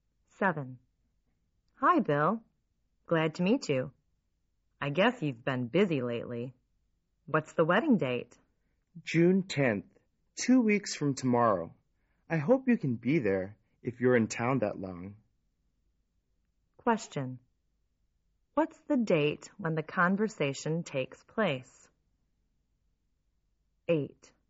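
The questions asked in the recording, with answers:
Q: What's the date when the conversation takes place?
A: May 26th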